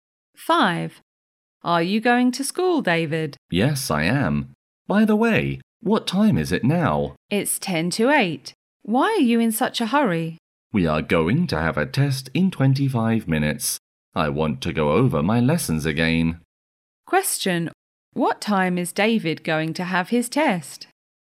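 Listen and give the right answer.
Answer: At 8:15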